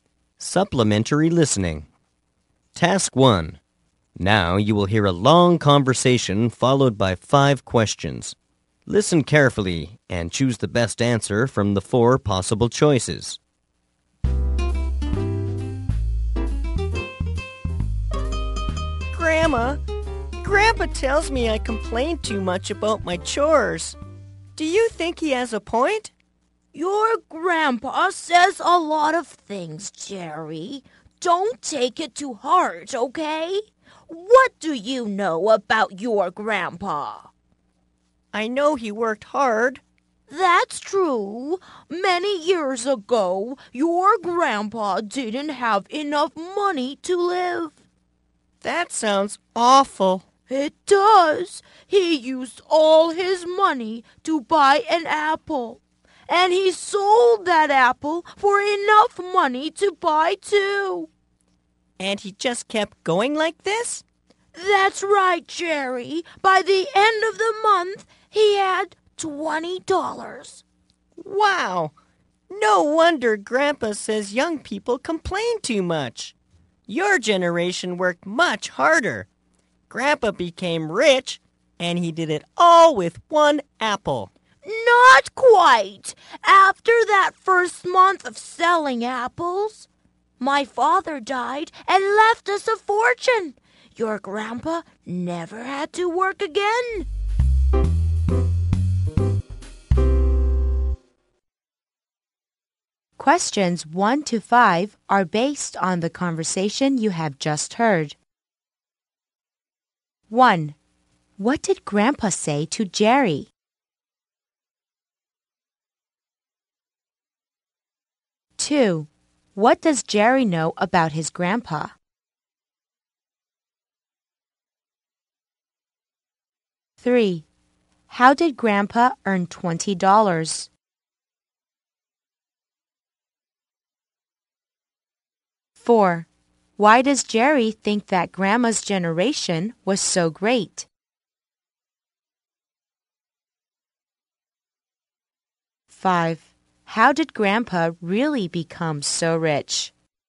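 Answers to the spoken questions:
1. That he complains too much about his chores.
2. He worked hard.
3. By buying and selling apples, starting with one apple.
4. He thinks they worked much harder.
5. Grandma's father died and left them a fortune.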